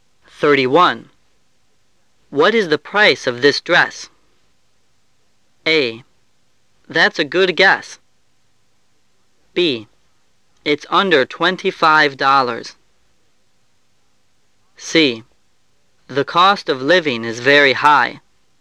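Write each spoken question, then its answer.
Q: What is the price of this dress?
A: B: It's under $25.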